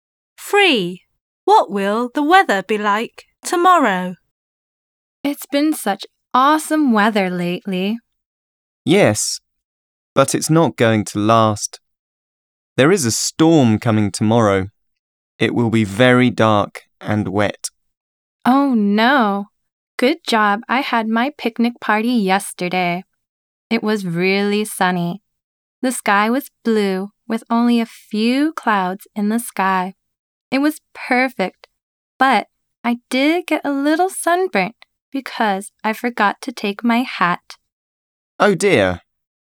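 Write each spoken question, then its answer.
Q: What will the weather be like tomorrow?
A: Stormy, dark and wet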